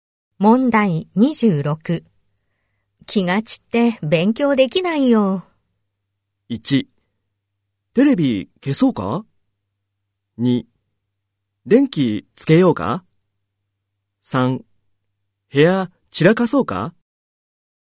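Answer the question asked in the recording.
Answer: 1: テレビ消そうか?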